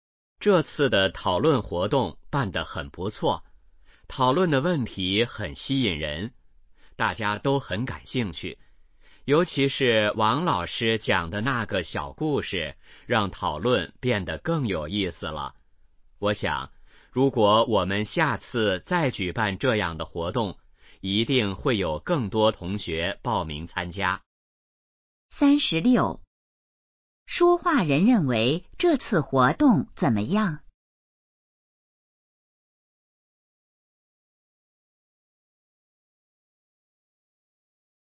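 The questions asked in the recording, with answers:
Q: 说话人认为这次活动怎么样?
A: 很不错

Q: 王老师在活动中做了什么?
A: 讲了一个小故事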